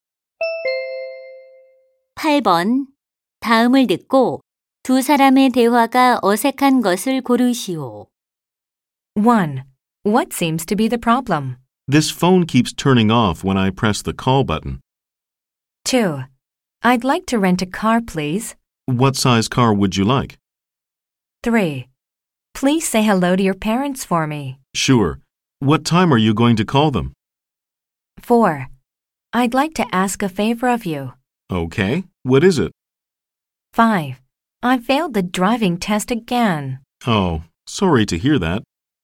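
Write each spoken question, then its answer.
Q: 다음을 듣고 두 사람의 대화가 어색한 것을 고르시오.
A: 3: Please say hello to your parents for me. / Sure. What time are you going to call them?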